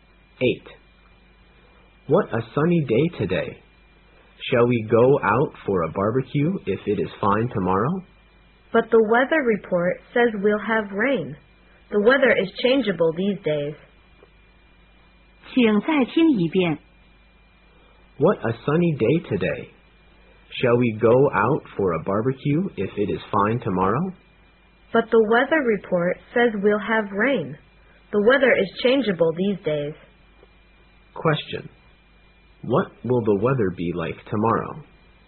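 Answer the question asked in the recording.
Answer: Rainy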